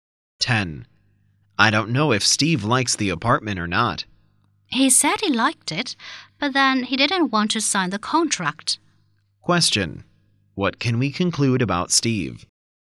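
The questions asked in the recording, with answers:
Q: What can we conclude about Steve?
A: He hasn't made up his mind about the apartment.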